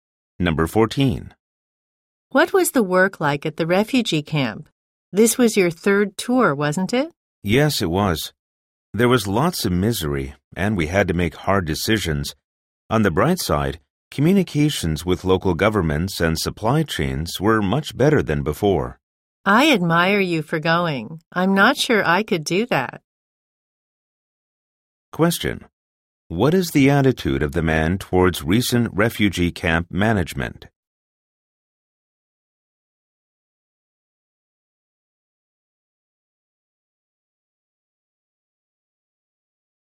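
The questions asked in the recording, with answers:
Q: What is the attitude of the man towards recent refugee camp management?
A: He thinks it has improved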